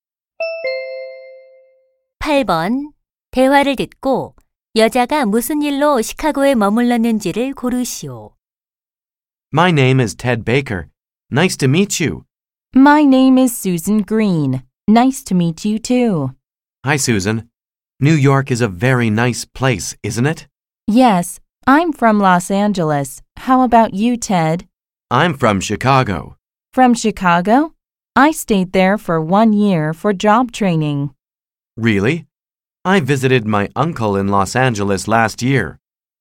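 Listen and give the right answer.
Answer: 직업 연수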